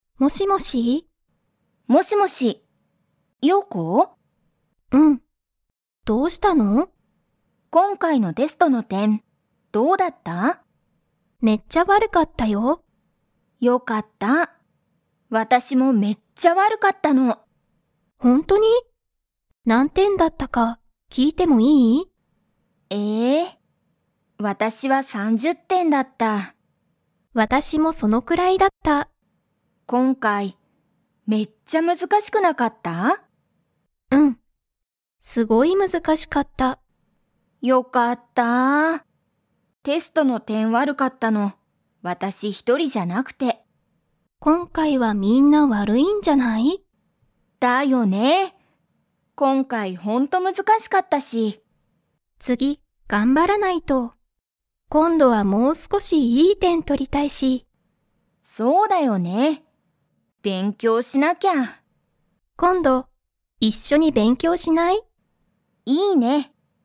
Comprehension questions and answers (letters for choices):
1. テストが悪(わる)かったのは、リエだけでしたか?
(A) はい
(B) いいえ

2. ヨウコは、今度(こんど)はもう少(すこ)し____点(てん)を取(と)りたい。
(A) 悪(わる)い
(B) 難(むずか)しい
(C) 一緒(いっしょ)の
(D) いい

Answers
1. B
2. D

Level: Level 2